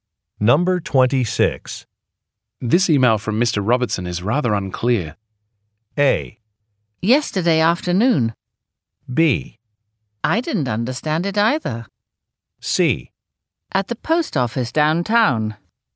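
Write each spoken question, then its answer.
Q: This email from Mr. Robertson is rather unclear.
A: B: I didn't understand it either.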